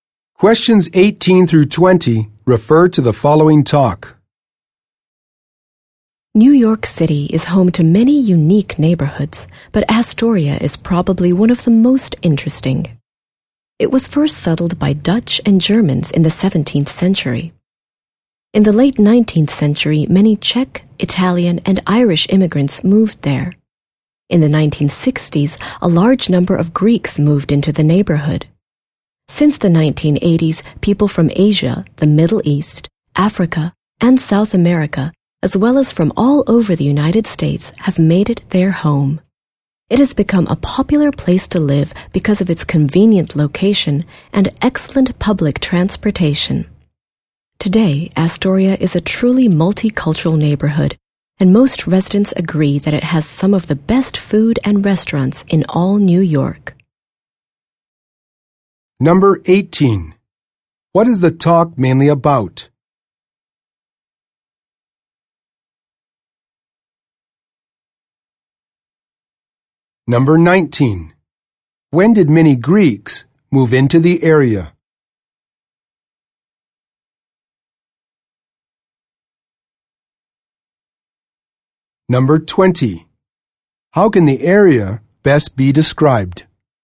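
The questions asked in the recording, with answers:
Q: What is the talk mainly about?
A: The Astoria neighborhood of New York

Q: When did many Greeks move into the area?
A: In the 1960s

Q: How can the area best be described?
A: Multicultural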